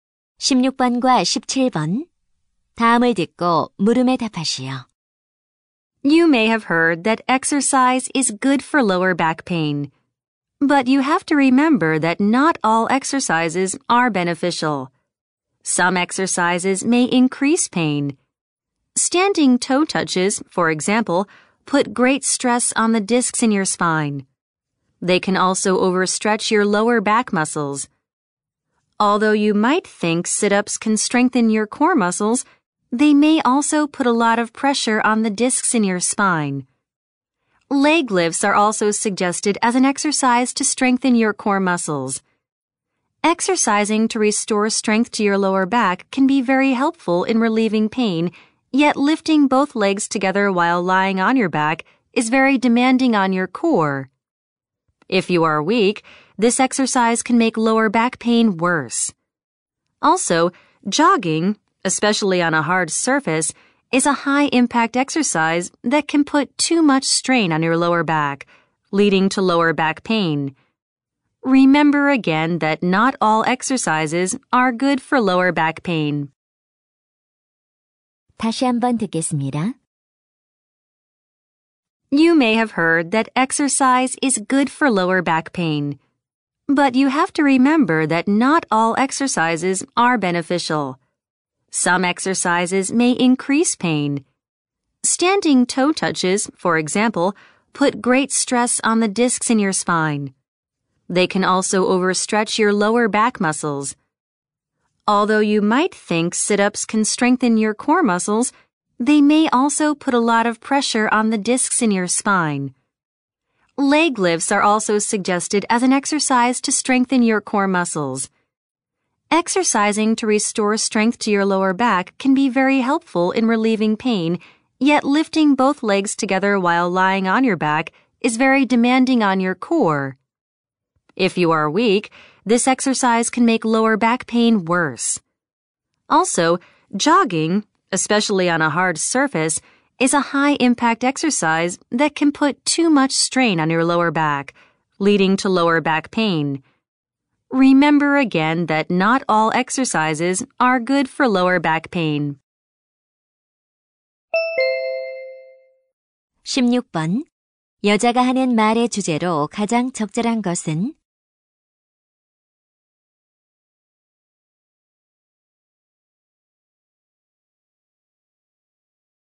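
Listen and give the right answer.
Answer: 허리 통증에 좋지 않은 운동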